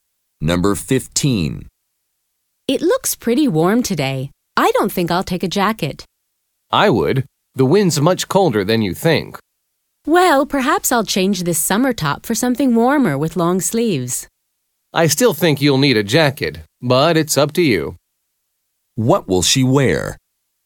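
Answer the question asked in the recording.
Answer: A long-sleeved top, no jacket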